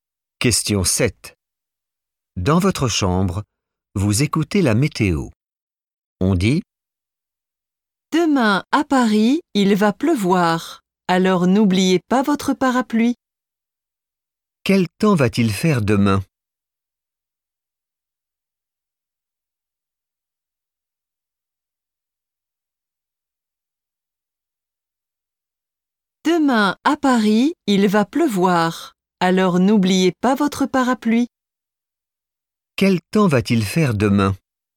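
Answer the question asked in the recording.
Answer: il va pleuvoir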